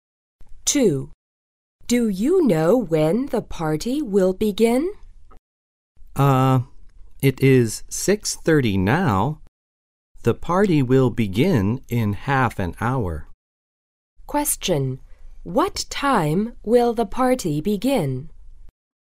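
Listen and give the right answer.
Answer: At 7:00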